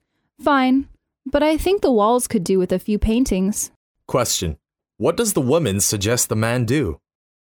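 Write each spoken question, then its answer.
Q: What does the woman suggest the man do?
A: Hang some paintings on the walls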